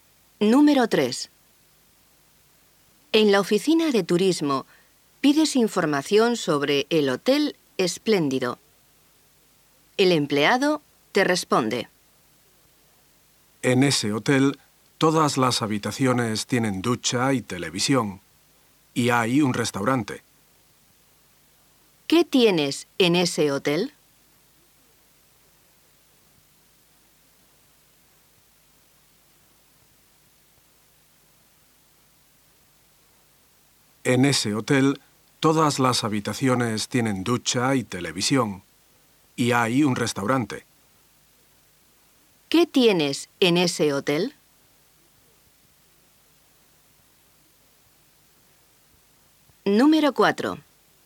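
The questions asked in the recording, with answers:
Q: ¿Qué tienes en ese hotel?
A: Ducha y televisión en todas las habitaciones, y un restaurante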